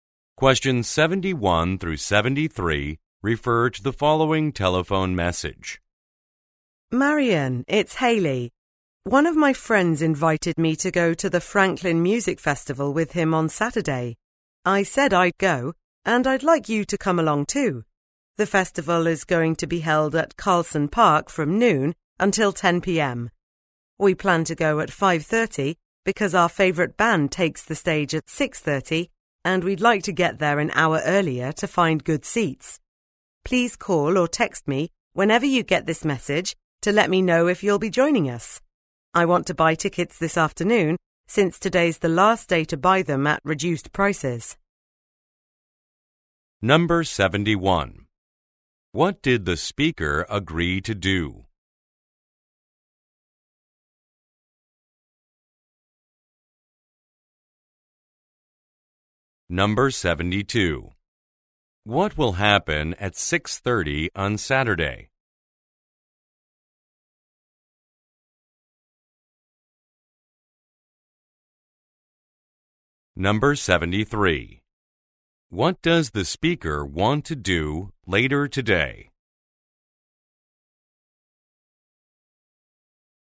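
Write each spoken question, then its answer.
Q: What did the speaker agree to do?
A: Go to the Franklin Music Festival with a friend

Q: What will happen at 6:30 on Saturday?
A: Their favourite band will perform

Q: What does the speaker want to do later today?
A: Buy tickets at reduced prices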